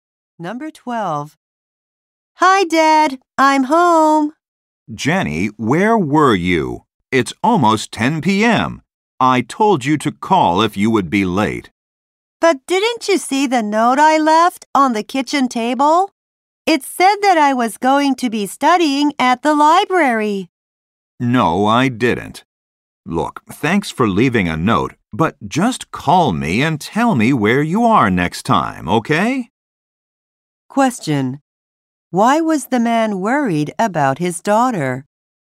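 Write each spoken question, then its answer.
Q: Why was the man worried about his daughter?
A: She came home late without calling.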